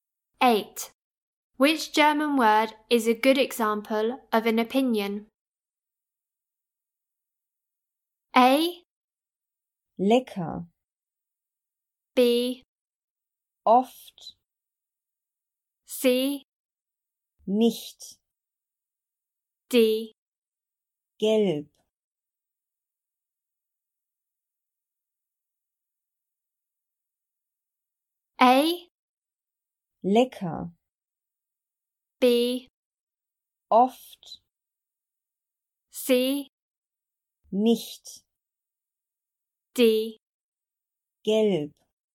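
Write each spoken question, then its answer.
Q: Which German word is a good example of an opinion?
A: A: Lecker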